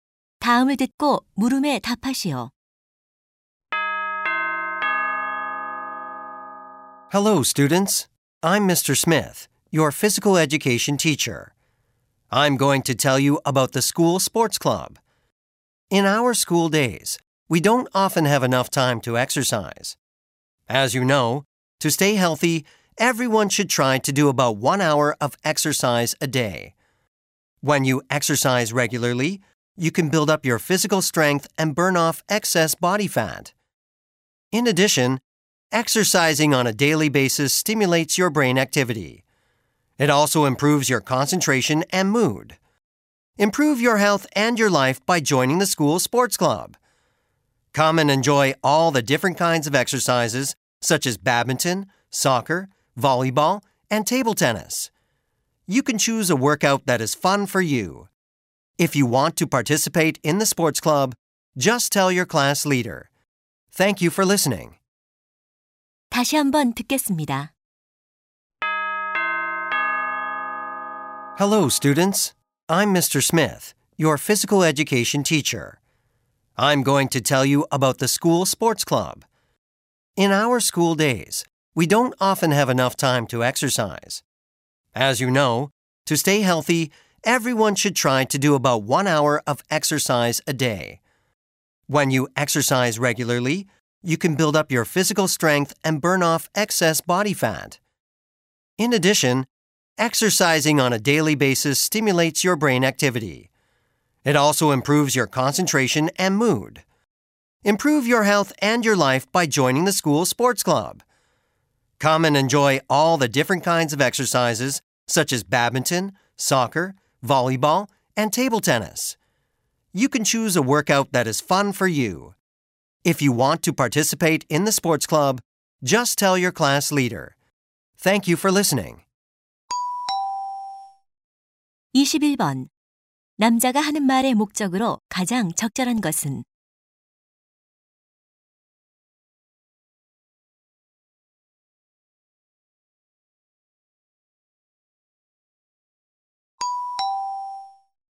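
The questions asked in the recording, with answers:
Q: 남자가 하는 말의 목적으로 가장 적절한 것은?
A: 학교 스포츠 클럽 가입을 권장하려고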